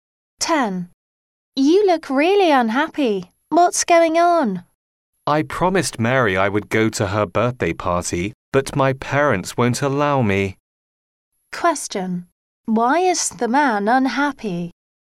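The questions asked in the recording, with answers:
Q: Why is the man unhappy?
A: His parents won't let him go to Mary's birthday party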